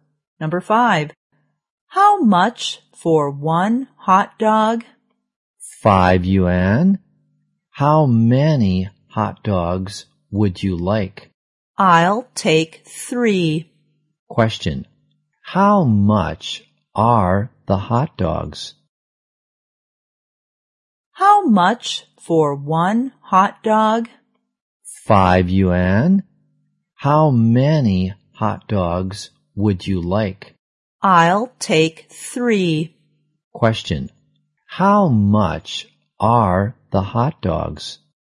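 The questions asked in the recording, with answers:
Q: Question, how much are the hot dogs?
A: 15 yuan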